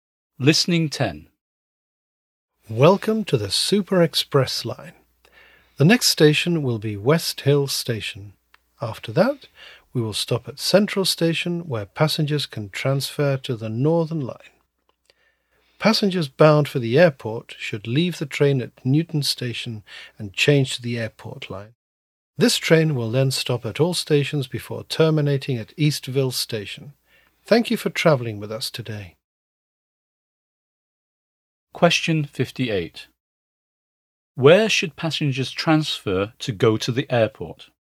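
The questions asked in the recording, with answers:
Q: Where should passengers transfer to go to the airport?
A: At Newton Station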